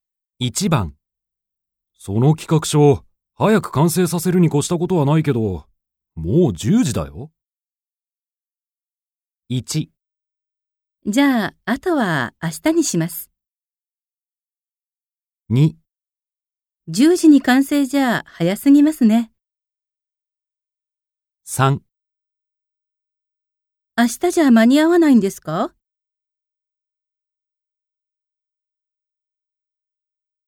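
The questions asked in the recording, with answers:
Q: その企画書、早く完成させるに越したことはないけど、もう10時だよ。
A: 1: じゃあ、あとは明日にします。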